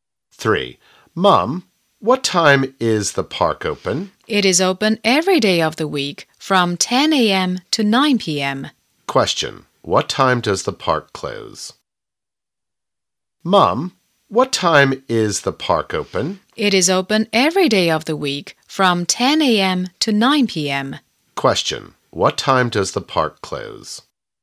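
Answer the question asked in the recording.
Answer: At 9 p.m.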